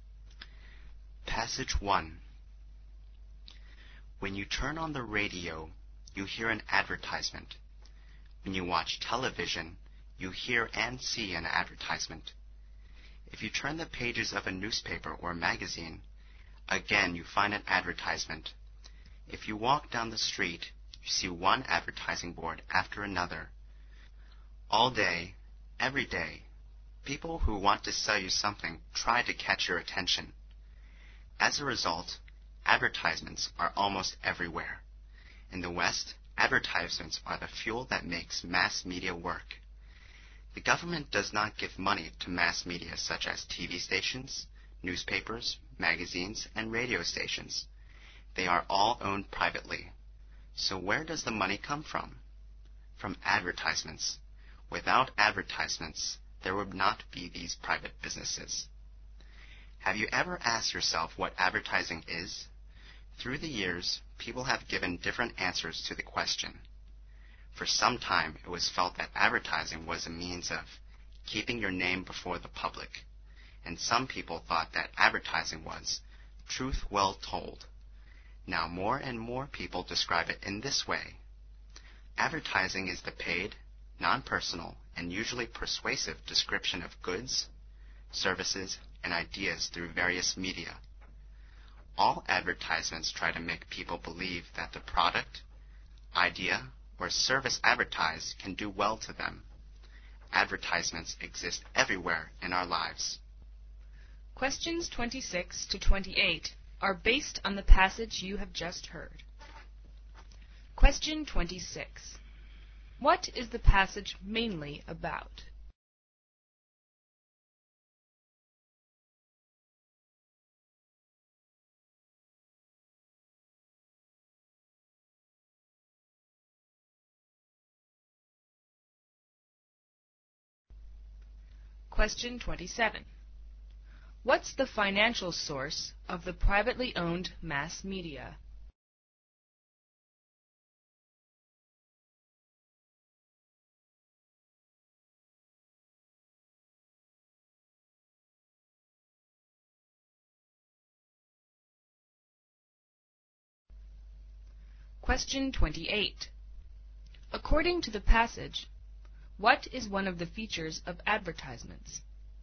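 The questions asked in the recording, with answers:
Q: What is the passage mainly about?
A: Advertisements

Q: What's the financial source of the privately owned mass media?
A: Advertisements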